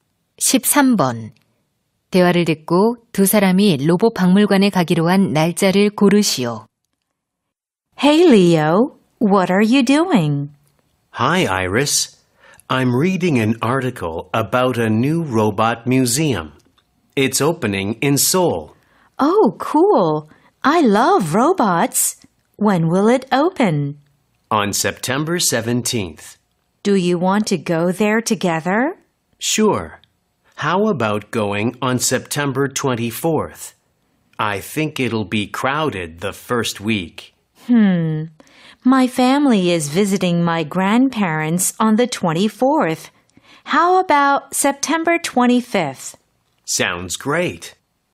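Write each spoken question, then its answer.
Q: 대화를 듣고 두 사람이 로봇 박물관에 가기로 한 날짜를 고르시오.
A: 9월 25일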